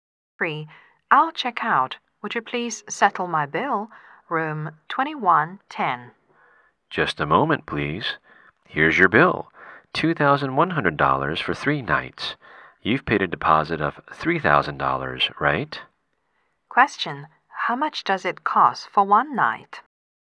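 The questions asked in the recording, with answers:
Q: How much does it cost for 1 night?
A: $700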